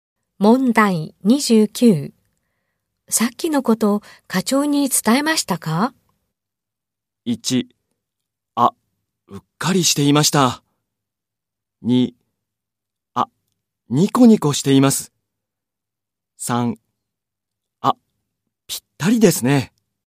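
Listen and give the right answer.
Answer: 1: あ、うっかりしていました。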